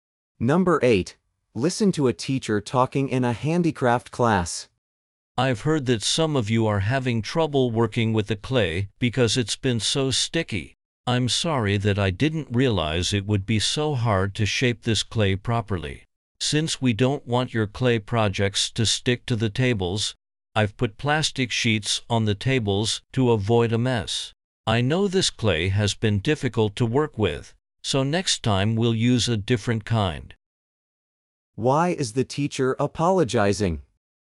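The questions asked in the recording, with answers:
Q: Why is the teacher apologizing?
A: The clay was too sticky and hard to shape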